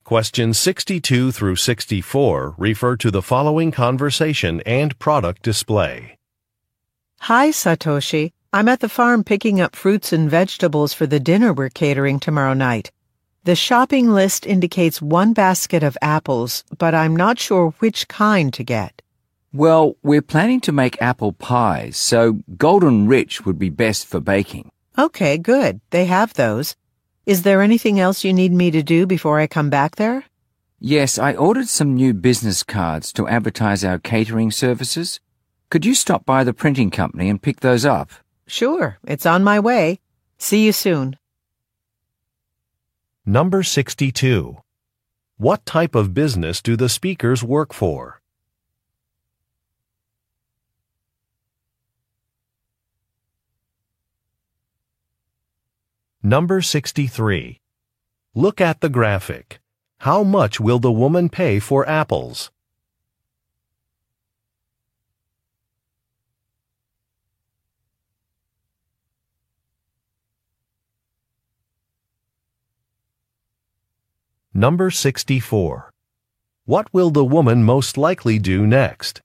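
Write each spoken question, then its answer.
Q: What type of business do the speakers work for?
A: A catering company

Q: What will the woman most likely do next?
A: Pick up business cards at the printing company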